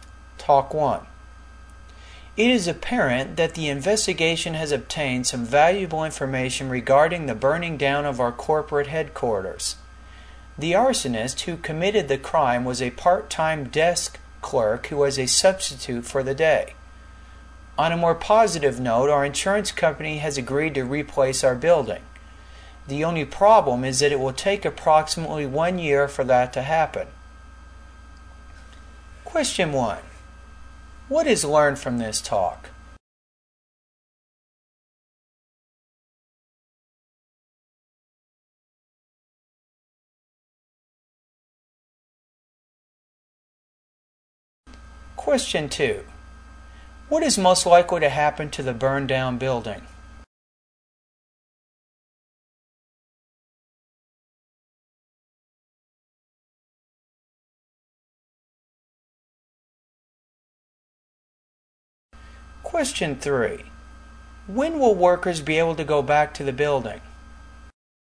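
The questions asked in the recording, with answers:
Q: What is most likely to happen to the burned down building?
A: The insurance company will replace it.

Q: When will workers be able to go back to the building?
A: In about one year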